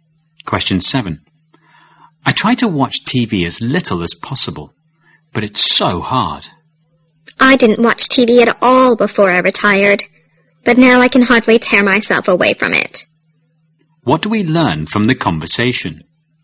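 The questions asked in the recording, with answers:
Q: What do we learn from the conversation?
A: The man has watched a lot of TV since he retired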